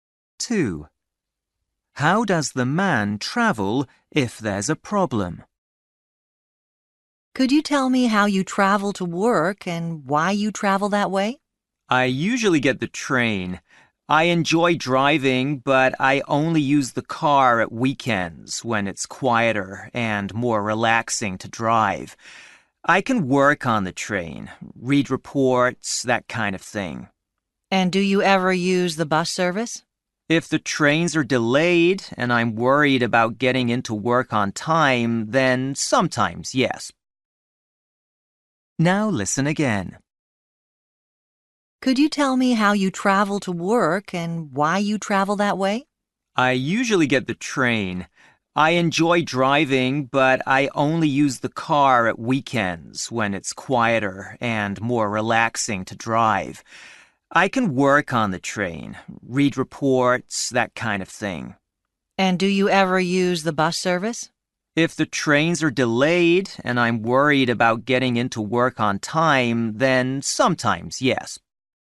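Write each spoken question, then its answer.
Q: How does the man travel if there's a problem?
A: by bus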